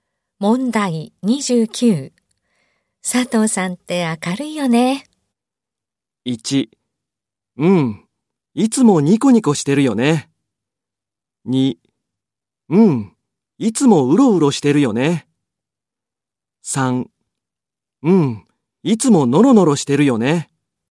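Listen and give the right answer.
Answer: 1: うん、いつもニコニコしてるよね。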